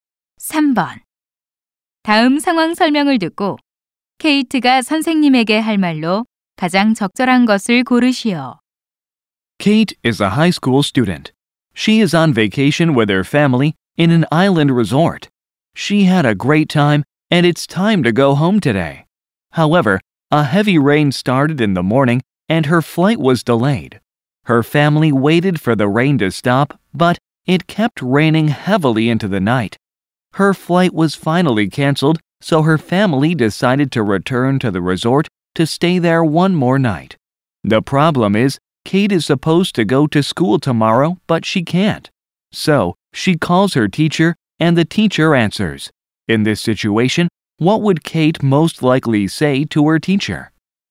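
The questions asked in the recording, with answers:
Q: In this situation, what would Kate most likely say to her teacher?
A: My flight was canceled, so I can't come to school tomorrow.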